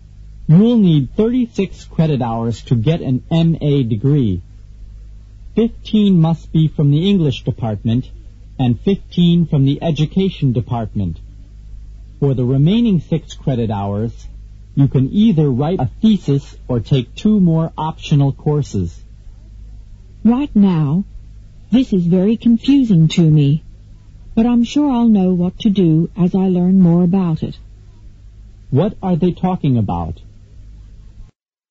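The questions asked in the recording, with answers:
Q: What are they talking about?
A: The requirements for getting an MA degree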